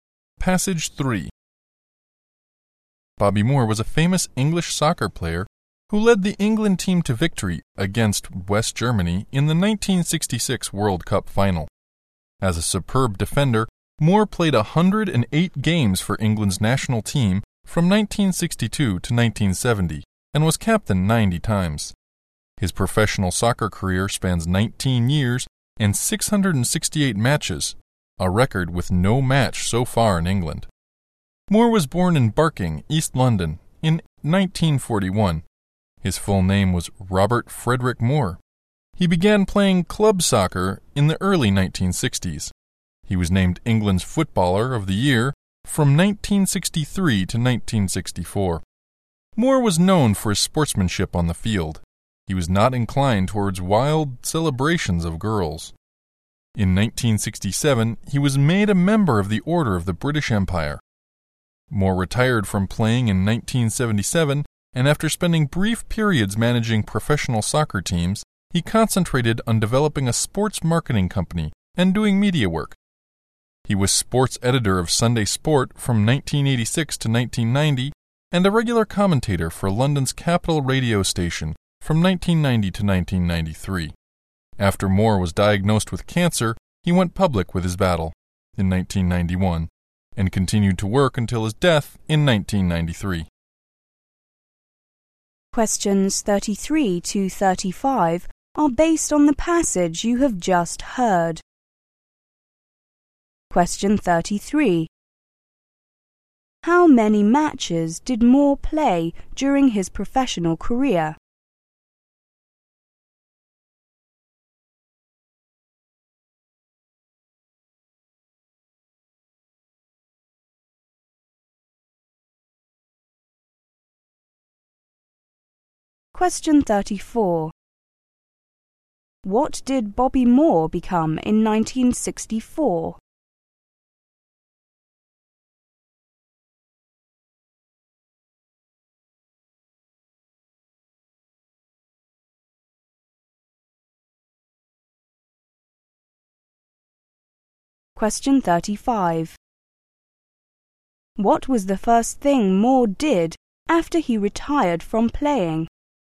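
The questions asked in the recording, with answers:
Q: How many matches did Moore play during his professional career?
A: 668

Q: What did Bobby Moore become in 1964?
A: England's Footballer of the Year

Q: What was the first thing Moore did after he retired from playing?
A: He briefly managed professional soccer teams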